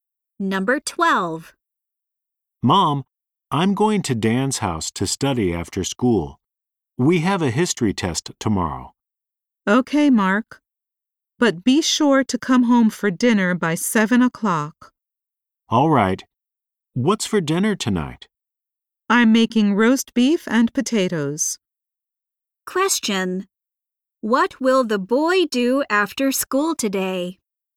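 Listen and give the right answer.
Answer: Study at Dan's house.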